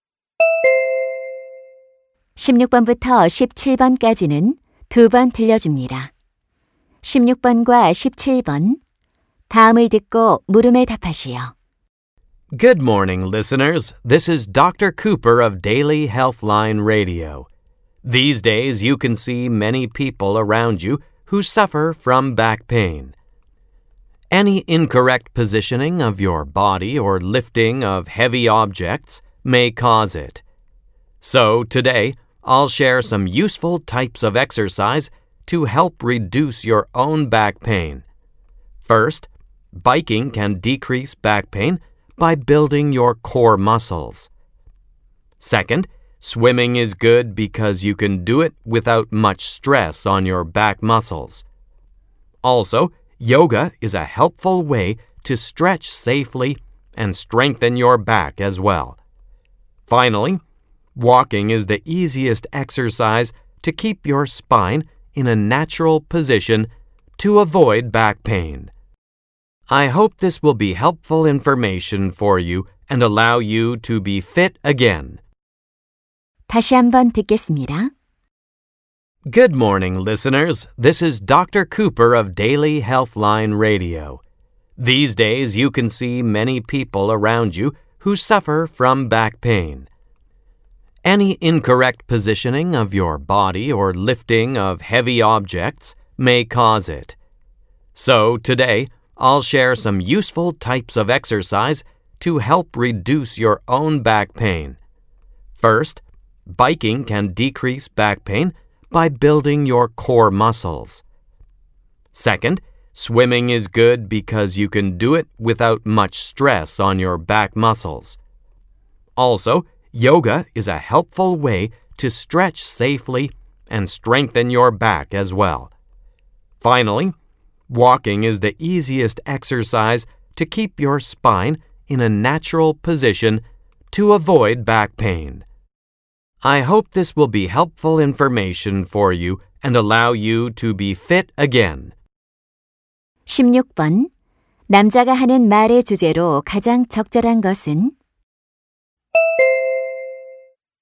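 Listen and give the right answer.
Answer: 허리 통증 완화에 도움이 되는 운동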